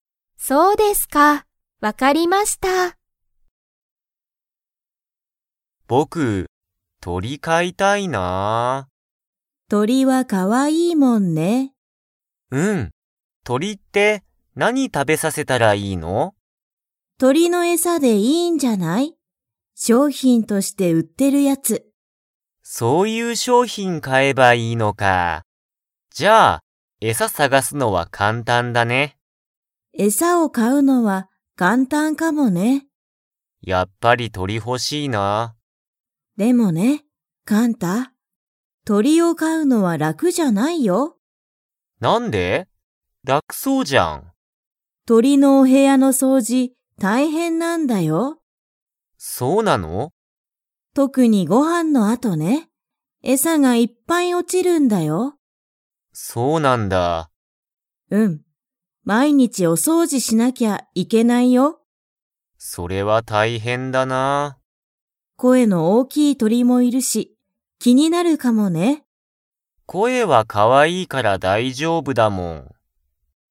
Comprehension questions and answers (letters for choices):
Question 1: 鳥とりの餌えさを買かうのは、 。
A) 簡単かんたんだ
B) 難むずかしい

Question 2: お母かあさんは、何なにが大変たいへんだと言いっていますか?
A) 鳥とりに餌えさをあげること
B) 鳥とりのお部屋へやの掃除そうじ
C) 鳥とりの声こえを聞きくこと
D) 鳥とりと遊あそぶこと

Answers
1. A
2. B

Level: Level 4